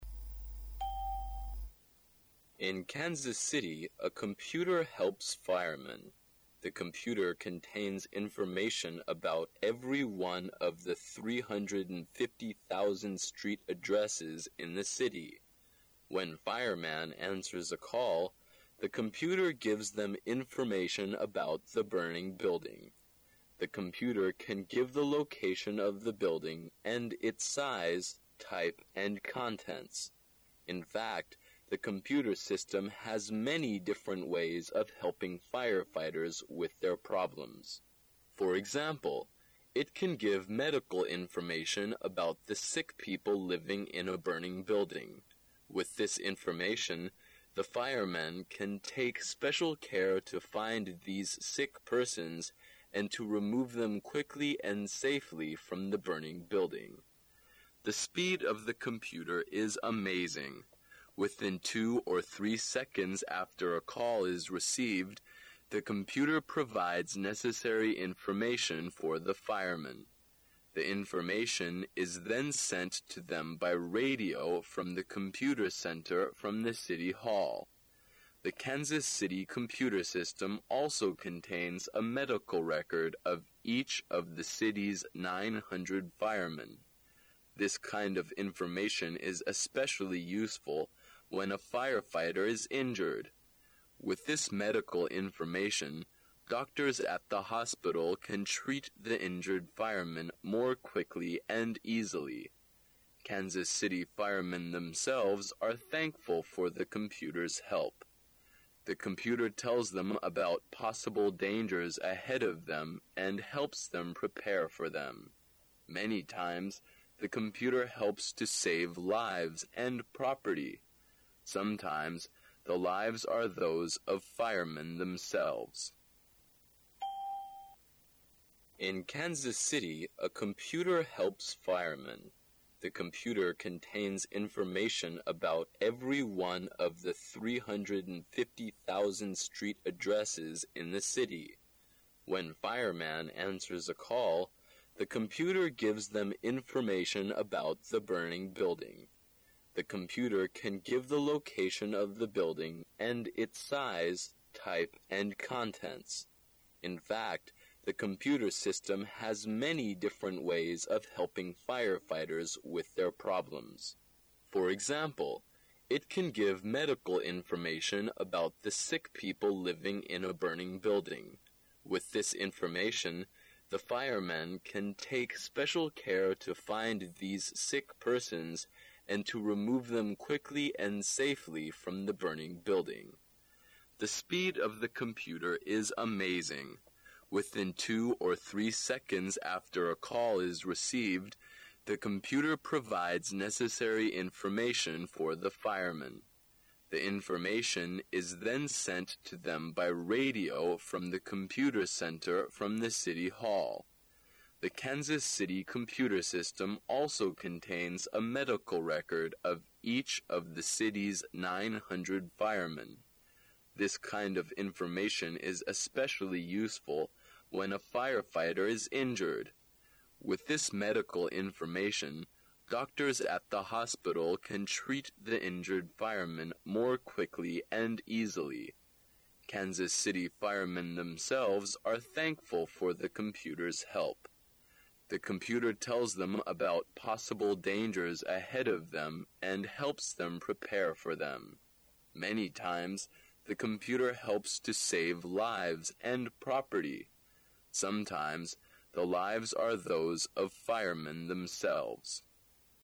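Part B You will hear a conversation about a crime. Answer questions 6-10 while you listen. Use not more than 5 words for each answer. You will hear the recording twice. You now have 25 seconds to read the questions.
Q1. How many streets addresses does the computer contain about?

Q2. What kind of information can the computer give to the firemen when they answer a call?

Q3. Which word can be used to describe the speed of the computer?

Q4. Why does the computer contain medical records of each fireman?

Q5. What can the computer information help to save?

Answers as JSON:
{"1": "350,000", "2": "information about the burning building", "3": "amazing", "4": "to help treat injured firemen", "5": "lives and property"}

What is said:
The computer contains information about every one of the 350,000 street addresses in the city. When fireman answers a call, the computer gives them information about the burning building. 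The computer can give the location of the building, and its size, type and contents. In fact, the computer system has many different ways of helping firefighters with their problems. For example, it can give medical information about the sick people living in a burning building. With this information, the firemen can take special care to find these sick persons and to remove them quickly and safely from the burning building. The speed of the computer is amazing. Within two or three seconds after a call is received, the computer provides necessary information for the firemen. The information is then sent to them by radio from the computer center from the City Hall. The Kansas city computer system also contains a medical record of each of the city's 900 firemen. This kind of information is especially useful when a fire fighter is injured. With this medical information, doctors at the hospital can treat the injured firemen more quickly and easily. 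Kansas city firemen themselves are thankful for the computer's help. The computer tells them about possible dangers ahead of them and helps them prepare for them. Many times the computer helps to save lives and property. Sometimes the lives are those of firemen themselves.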